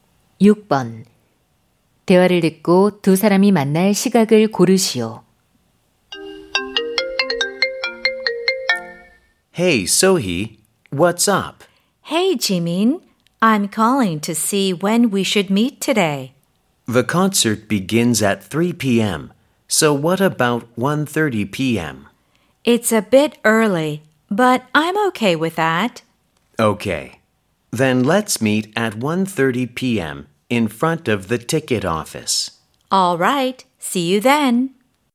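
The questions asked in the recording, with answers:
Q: 대화를 듣고 두 사람이 만날 시각을 고르시오.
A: 오후 1시 30분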